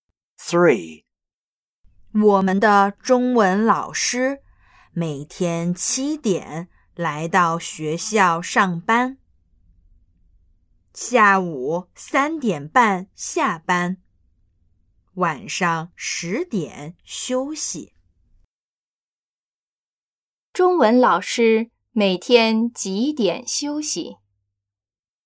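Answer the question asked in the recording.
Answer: 晚上十点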